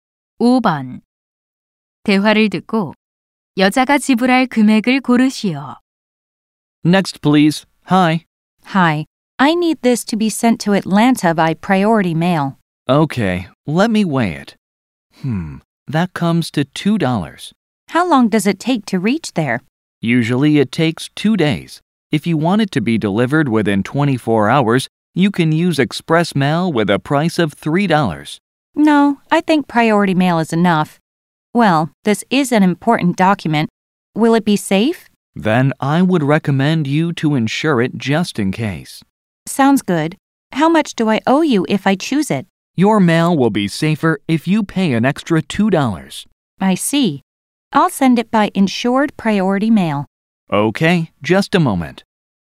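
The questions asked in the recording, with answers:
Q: 대화를 듣고 여자가 지불할 금액을 고르시오.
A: 4달러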